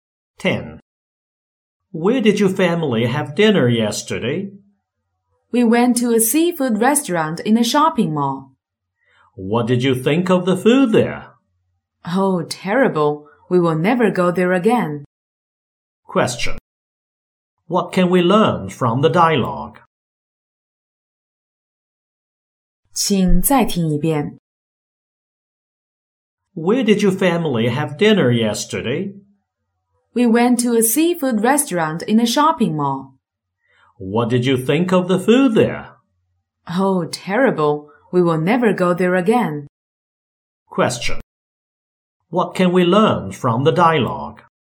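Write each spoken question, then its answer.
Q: What can we learn from the dialogue?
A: The family didn't enjoy the food at the seafood restaurant and won't go there again.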